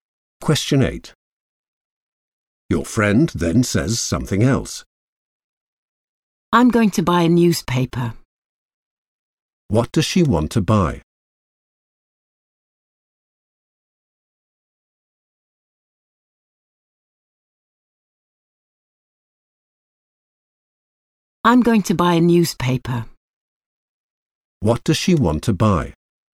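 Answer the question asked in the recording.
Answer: a newspaper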